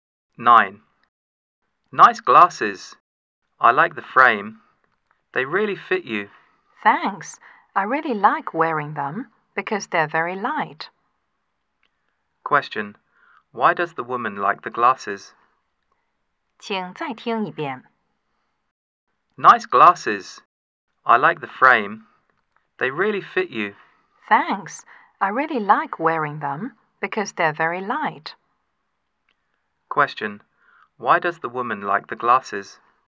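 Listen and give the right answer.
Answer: Because they're very light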